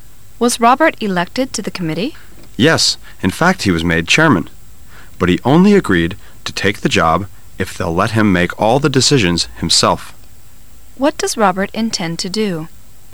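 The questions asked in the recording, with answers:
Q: What does Robert intend to do?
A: Make all the committee's decisions himself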